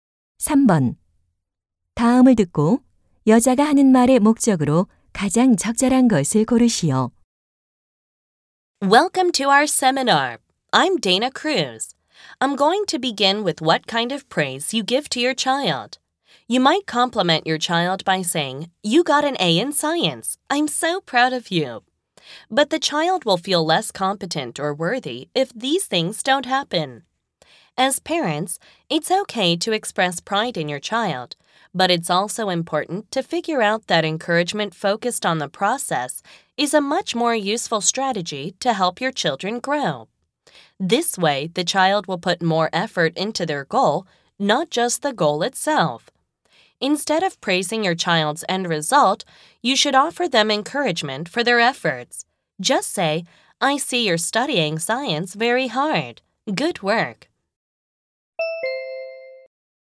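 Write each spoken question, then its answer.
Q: 다음을 듣고 여자가 하는 말의 목적으로 가장 적절한 것을 고르시오.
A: 자녀의 결과가 아닌 노력을 칭찬하도록 조언하려고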